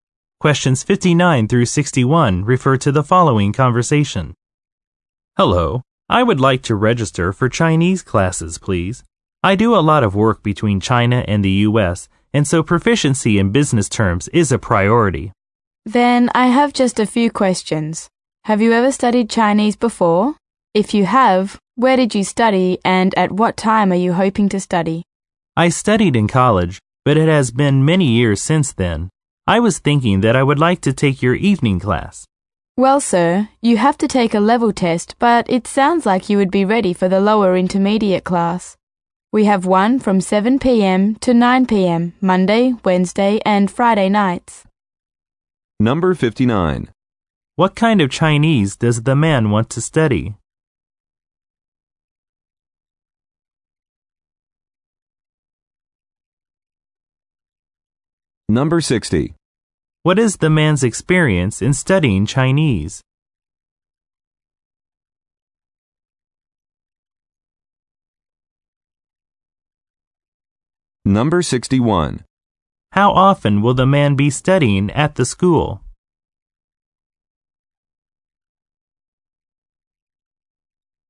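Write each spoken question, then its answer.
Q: What kind of Chinese does the man want to study?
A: Business Chinese

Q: What is the man's experience in studying Chinese?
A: He studied it in college many years ago

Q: How often will the man be studying at the school?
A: Three times a week (Monday, Wednesday, Friday nights)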